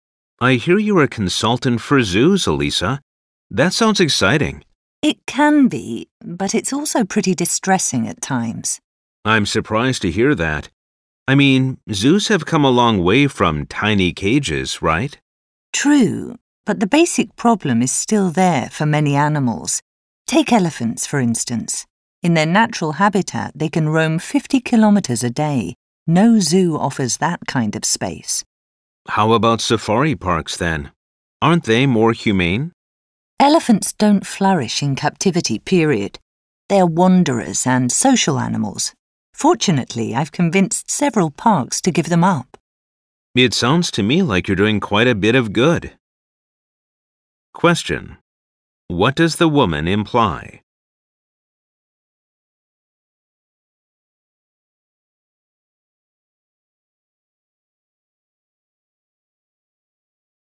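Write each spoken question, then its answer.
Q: What does the woman imply?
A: Elephants should not be kept in zoos or safari parks, because they don't do well in captivity.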